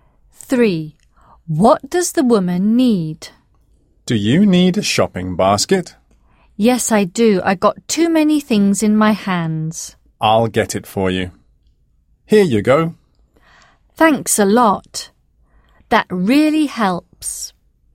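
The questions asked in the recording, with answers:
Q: What does the woman need?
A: a shopping basket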